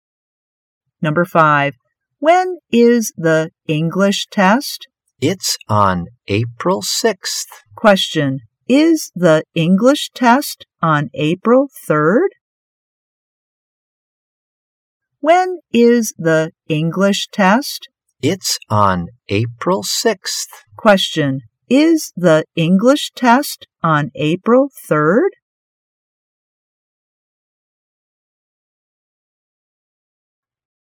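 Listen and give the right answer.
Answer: No, it's on April 6th.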